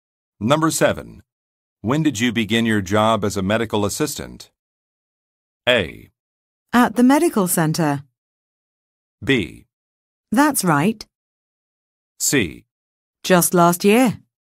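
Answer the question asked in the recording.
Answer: C: Just last year.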